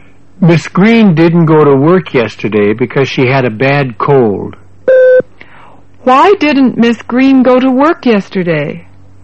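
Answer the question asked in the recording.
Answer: Because she had a bad cold.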